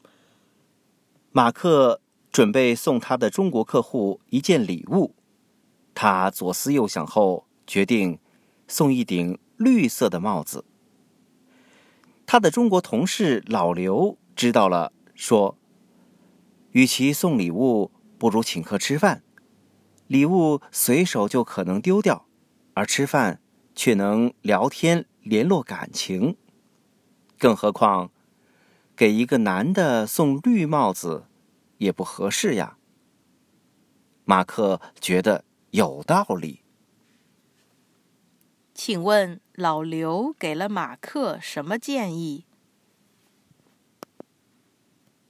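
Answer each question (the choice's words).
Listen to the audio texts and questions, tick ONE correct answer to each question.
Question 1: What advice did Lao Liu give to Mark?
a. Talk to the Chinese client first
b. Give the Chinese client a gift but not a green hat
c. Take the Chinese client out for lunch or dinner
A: Take the Chinese client out for lunch or dinner

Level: Advanced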